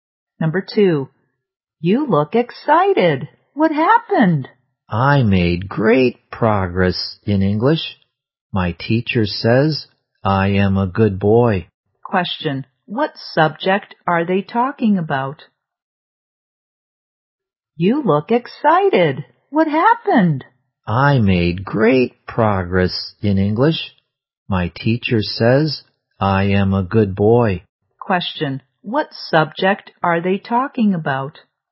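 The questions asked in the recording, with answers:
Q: What subject are they talking about?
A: English.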